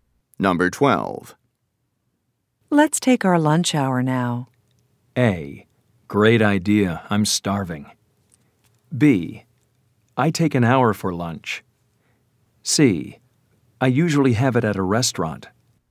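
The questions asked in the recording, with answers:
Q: Let's take our lunch hour now.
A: A: Great idea. I'm starving.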